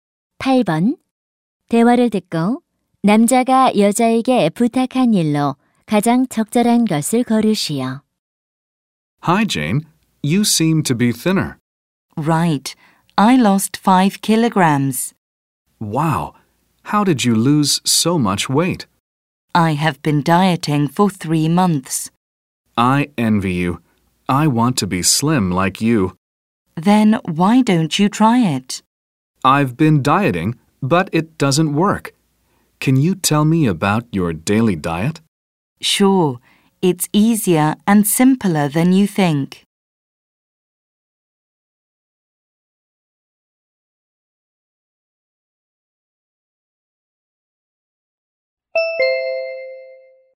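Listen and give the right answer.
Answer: 매일의 식단에 대해 알려 주기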